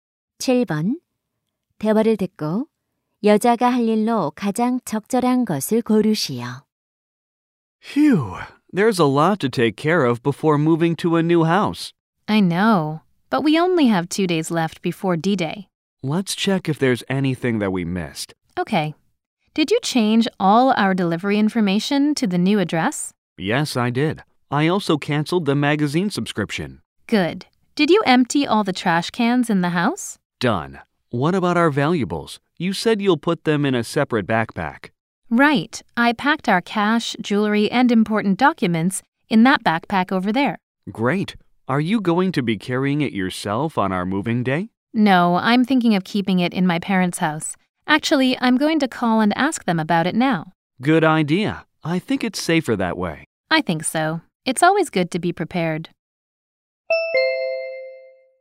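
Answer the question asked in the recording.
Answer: 부모님께 전화해 귀중품 보관을 부탁하기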